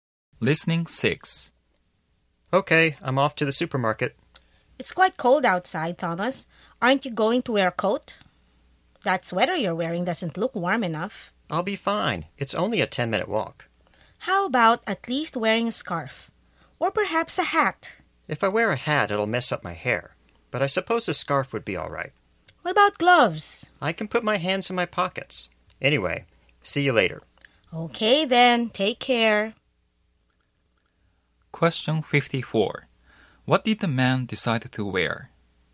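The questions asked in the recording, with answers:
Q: What did the man decide to wear?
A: A scarf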